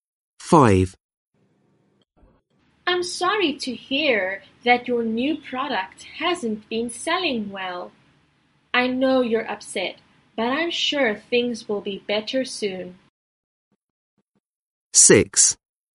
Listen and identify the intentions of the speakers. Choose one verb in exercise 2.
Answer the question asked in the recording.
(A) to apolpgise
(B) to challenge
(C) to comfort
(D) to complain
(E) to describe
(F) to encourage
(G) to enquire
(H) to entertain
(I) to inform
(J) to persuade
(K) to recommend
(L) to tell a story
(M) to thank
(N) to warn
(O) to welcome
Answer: (C) to comfort

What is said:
5. I'm sorry to hear that your new product hasn't been selling well. I know you're upset, but I'm sure things will be better soon.

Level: Lớp 10